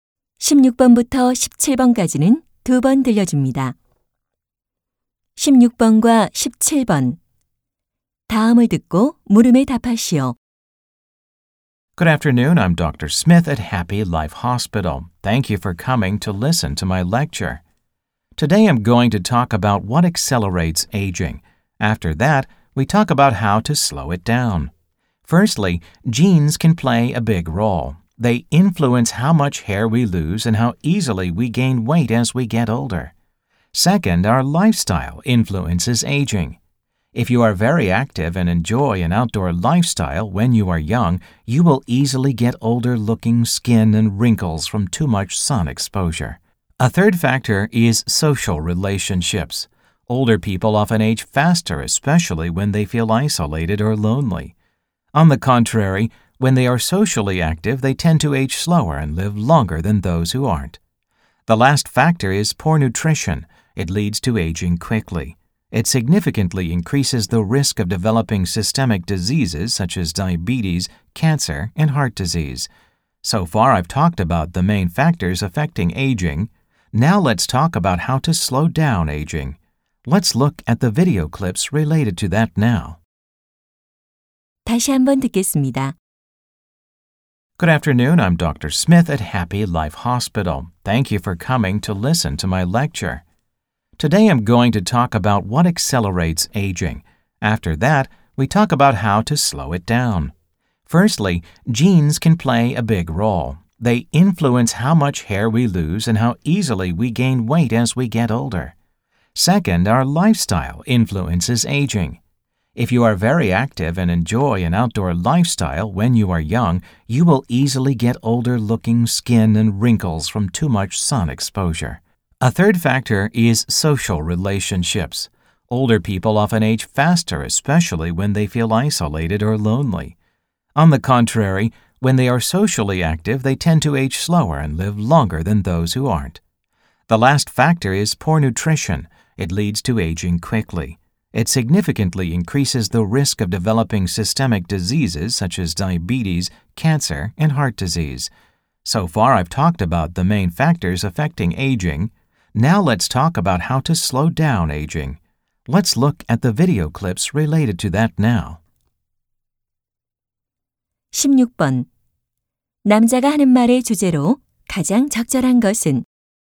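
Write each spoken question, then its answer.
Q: 남자가 하는 말의 주제로 가장 적절한 것은?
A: 노화를 촉진하는 요인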